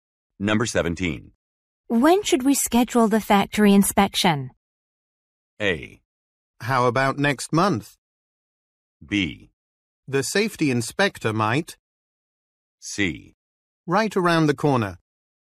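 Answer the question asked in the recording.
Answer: A: How about next month?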